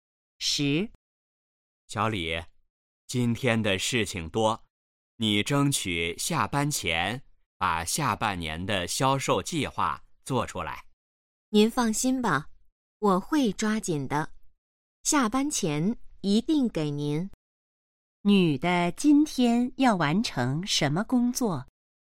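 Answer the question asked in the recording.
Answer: 下半年的销售计划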